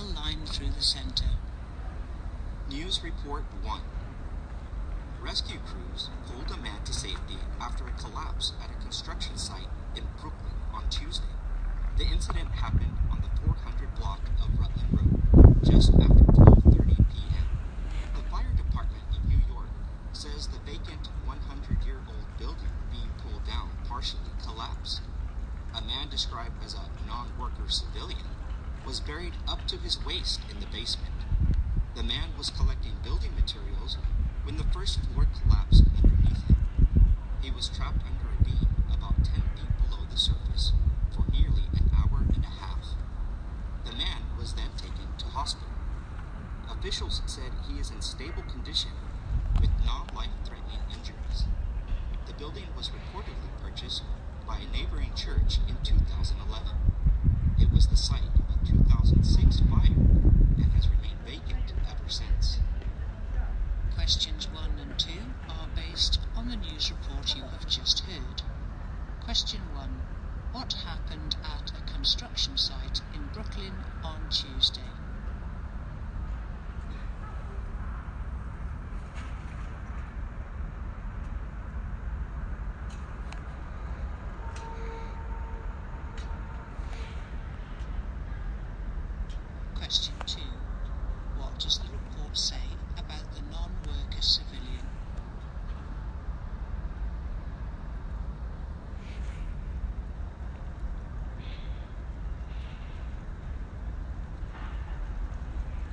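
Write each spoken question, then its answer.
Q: What happened at a construction site in Brooklyn on Tuesday?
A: A vacant old building being pulled down partially collapsed, trapping a man.

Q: What does the report say about the non-worker civilian?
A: He was trapped for nearly an hour and a half, but is in stable condition with non-life-threatening injuries.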